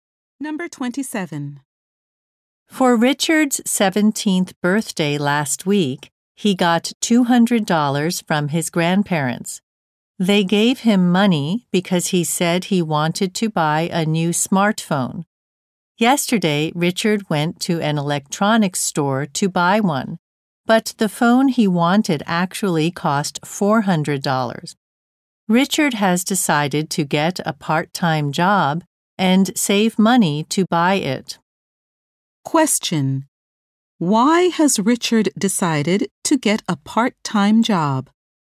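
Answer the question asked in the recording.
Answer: The phone he wanted cost more than he had.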